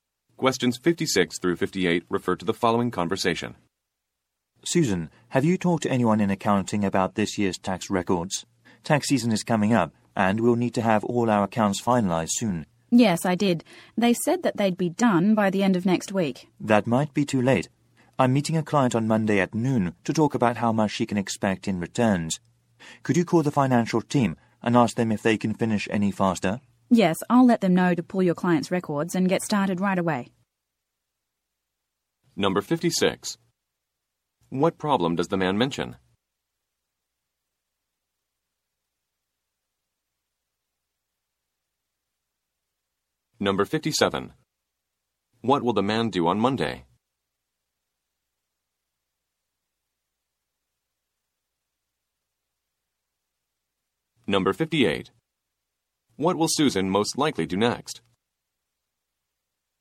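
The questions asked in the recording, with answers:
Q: What will the man do on Monday?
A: Meet a client

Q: What will Susan most likely do next?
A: Call the financial team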